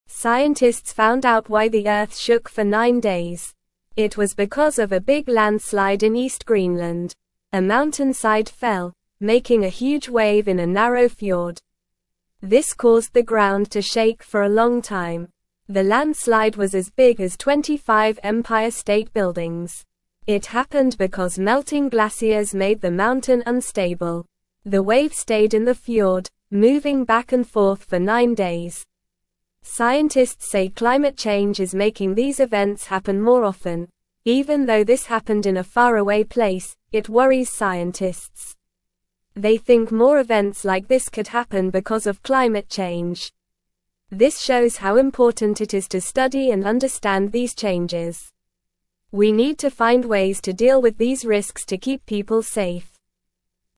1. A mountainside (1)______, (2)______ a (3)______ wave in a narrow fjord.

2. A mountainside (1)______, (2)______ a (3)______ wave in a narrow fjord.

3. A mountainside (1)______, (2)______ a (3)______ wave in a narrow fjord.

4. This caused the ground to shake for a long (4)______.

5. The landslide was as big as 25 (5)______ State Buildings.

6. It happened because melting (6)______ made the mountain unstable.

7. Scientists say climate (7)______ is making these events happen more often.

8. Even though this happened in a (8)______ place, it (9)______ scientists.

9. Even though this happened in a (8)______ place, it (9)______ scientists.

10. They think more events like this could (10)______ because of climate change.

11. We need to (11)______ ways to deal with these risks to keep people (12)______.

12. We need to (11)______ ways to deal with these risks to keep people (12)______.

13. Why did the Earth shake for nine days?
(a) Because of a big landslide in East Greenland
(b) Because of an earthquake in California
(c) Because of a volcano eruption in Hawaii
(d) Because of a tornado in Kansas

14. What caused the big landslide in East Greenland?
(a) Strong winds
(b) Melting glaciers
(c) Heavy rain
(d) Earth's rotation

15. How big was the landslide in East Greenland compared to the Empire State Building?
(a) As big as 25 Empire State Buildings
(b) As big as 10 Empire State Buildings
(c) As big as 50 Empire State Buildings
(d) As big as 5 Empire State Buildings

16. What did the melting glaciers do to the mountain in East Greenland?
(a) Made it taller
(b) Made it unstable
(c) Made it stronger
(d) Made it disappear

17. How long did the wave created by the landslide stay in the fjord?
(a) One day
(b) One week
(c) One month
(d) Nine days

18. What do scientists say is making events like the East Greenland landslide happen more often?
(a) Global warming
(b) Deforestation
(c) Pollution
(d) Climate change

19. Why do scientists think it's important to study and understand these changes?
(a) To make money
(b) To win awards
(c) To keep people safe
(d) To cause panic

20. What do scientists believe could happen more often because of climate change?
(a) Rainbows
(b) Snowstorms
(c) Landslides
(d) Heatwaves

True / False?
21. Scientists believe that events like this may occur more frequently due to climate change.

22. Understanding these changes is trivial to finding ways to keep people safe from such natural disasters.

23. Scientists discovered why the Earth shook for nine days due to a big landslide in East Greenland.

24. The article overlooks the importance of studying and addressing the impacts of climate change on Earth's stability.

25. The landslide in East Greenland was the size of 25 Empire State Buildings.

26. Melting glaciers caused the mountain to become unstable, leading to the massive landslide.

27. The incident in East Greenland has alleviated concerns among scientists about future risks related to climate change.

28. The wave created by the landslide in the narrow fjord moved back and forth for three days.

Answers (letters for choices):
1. fell
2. making
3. huge
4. time
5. Empire
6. glaciers
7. change
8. faraway
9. worries
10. happen
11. find
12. safe
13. a
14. b
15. a
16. b
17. d
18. d
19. c
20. c
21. True
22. False
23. True
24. False
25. True
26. True
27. False
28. False

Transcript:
Scientists found out why the Earth shook for nine days. It was because of a big landslide in East Greenland. A mountainside fell, making a huge wave in a narrow fjord. This caused the ground to shake for a long time.
The landslide was as big as 25 Empire State Buildings. It happened because melting glaciers made the mountain unstable. The wave stayed in the fjord, moving back and forth for nine days. Scientists say climate change is making these events happen more often.
Even though this happened in a faraway place, it worries scientists. They think more events like this could happen because of climate change. This shows how important it is to study and understand these changes. We need to find ways to deal with these risks to keep people safe.

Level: Level 2